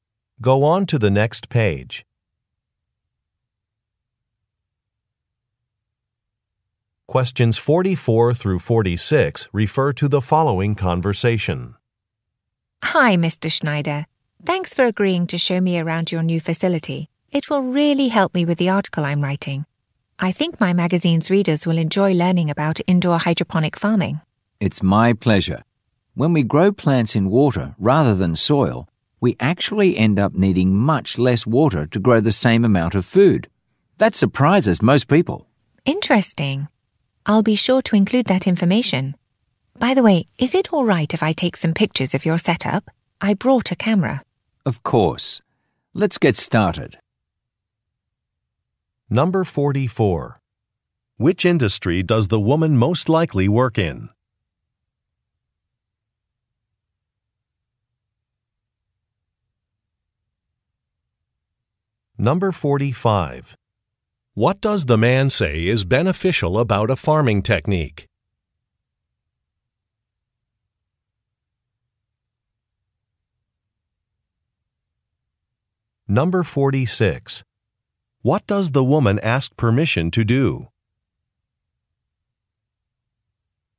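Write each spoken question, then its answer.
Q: Which industry does the woman most likely work in?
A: Publishing (magazine)

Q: What does the man say is beneficial about a farming technique?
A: It uses less water

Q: What does the woman ask permission to do?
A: Take pictures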